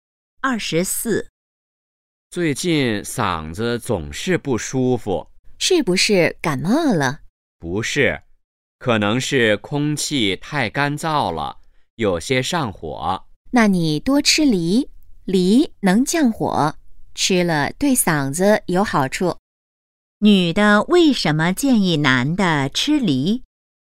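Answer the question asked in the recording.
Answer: 梨能降火,对嗓子有好处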